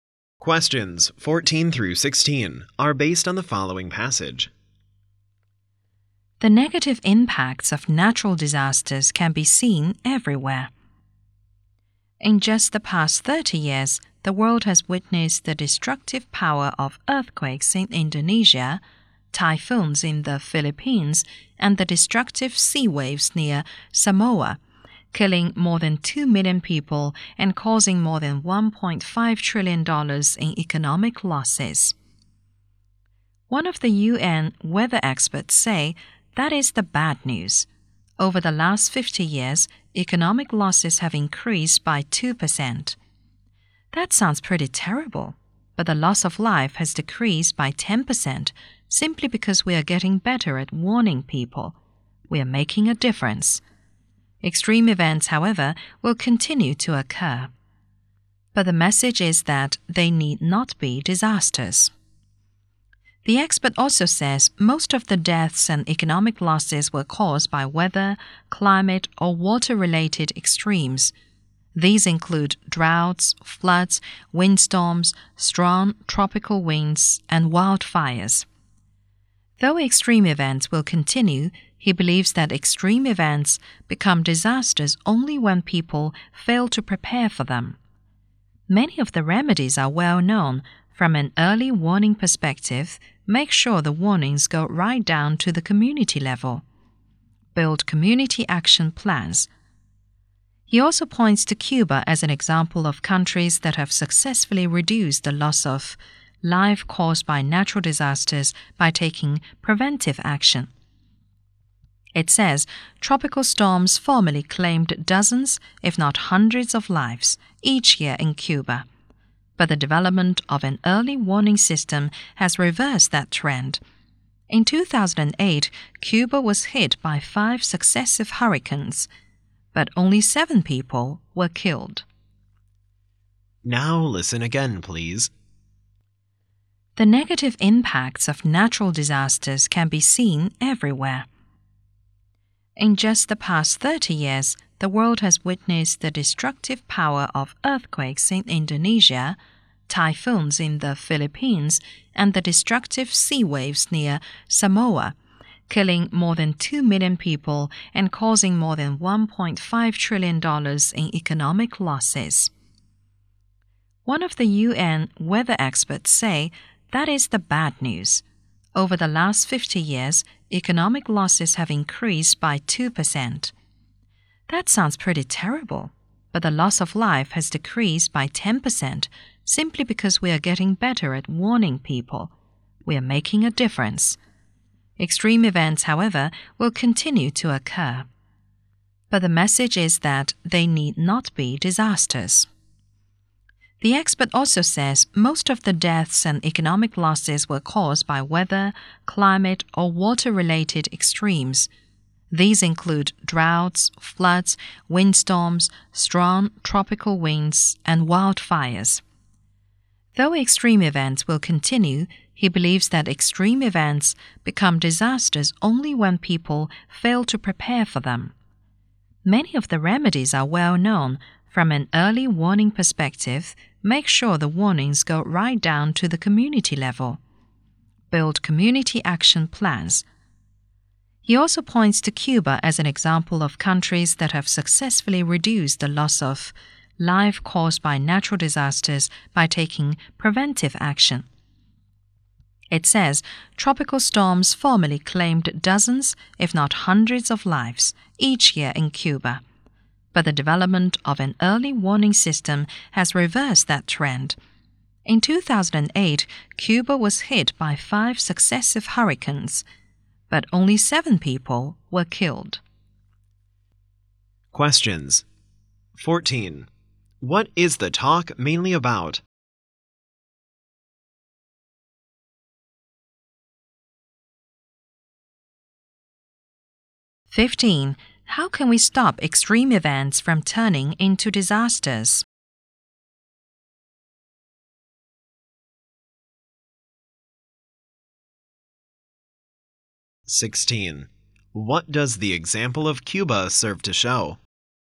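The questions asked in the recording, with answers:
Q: How can we stop extreme events from turning into disasters?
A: By preparing for them, e.g. early warnings to communities and community action plans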